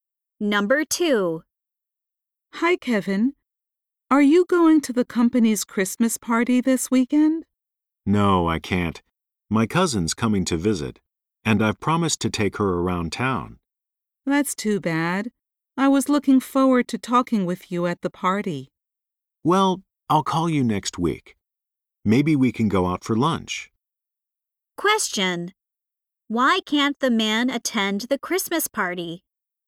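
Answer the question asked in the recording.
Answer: He promised to show his visiting cousin around town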